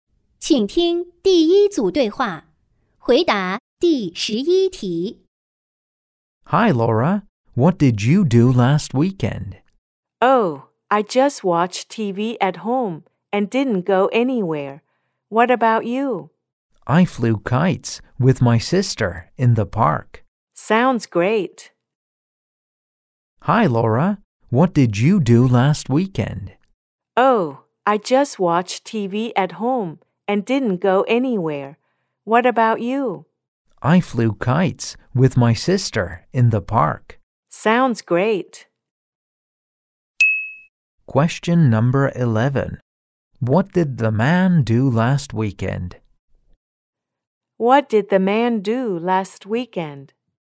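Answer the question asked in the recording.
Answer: He flew kites with his sister in the park.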